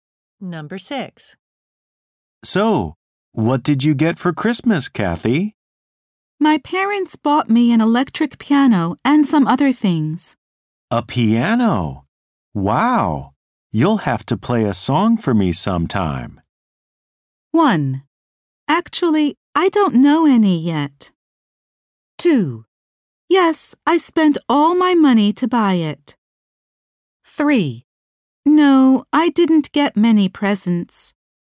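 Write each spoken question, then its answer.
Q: A piano? Wow! You'll have to play a song for me sometime.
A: 1: Actually, I don't know any yet.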